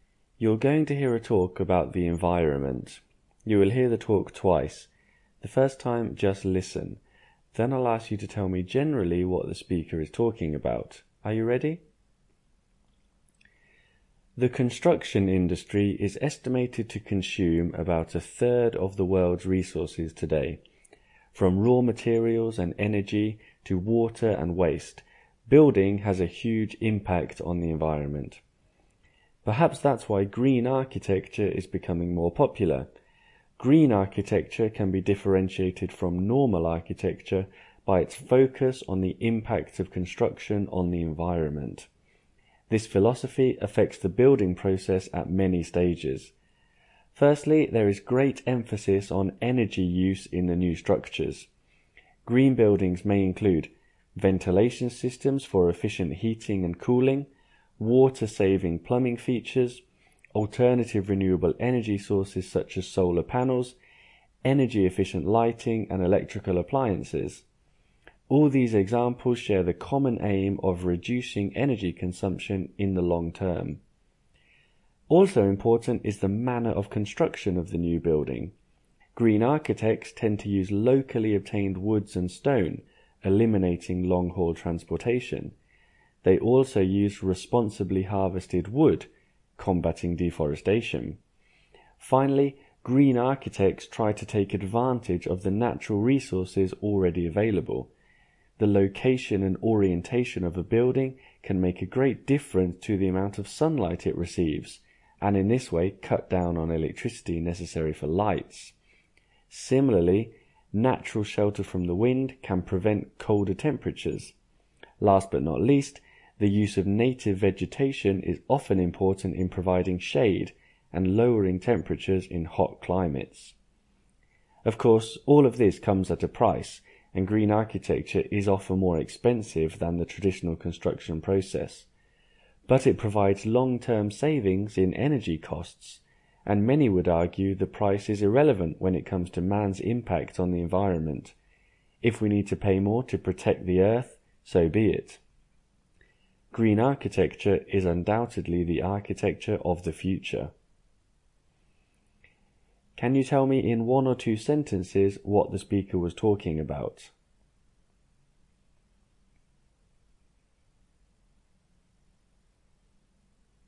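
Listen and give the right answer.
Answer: Green architecture: building in ways that reduce construction's impact on the environment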